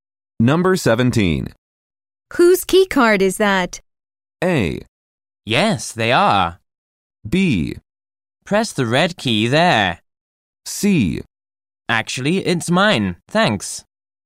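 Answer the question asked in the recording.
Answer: C: Actually, it's mine, thanks.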